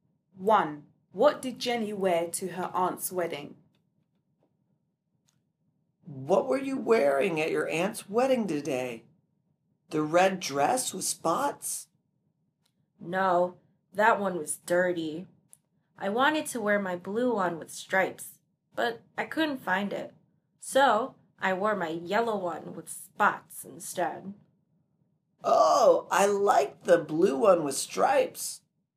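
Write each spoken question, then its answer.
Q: What did Jenny wear to her aunt's wedding?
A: Her yellow dress with spots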